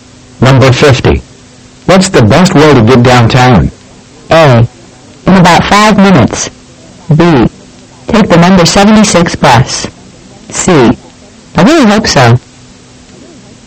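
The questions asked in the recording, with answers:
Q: What's the best way to get downtown?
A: B: Take the number 76 bus.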